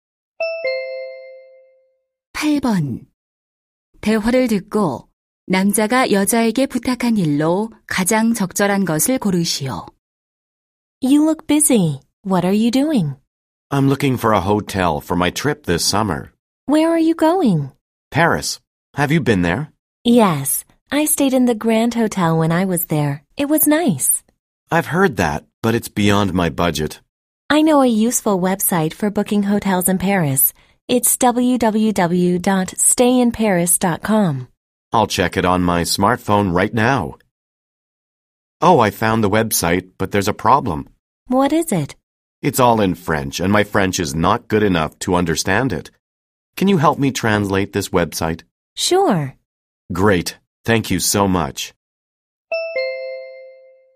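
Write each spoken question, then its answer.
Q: 대화를 듣고 남자가 여자에게 부탁한 일로 가장 적절한 것을 고르시오.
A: 프랑스어 웹사이트 번역하기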